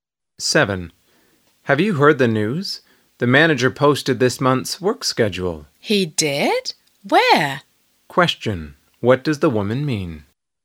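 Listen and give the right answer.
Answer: She didn't know the schedule had been posted and wants to know where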